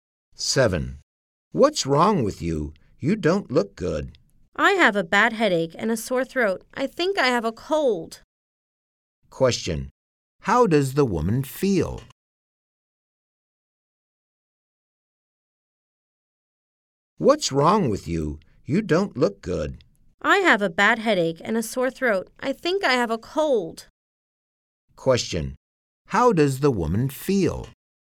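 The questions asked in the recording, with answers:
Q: How does the woman feel?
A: She has a bad headache and a sore throat; she thinks she has a cold.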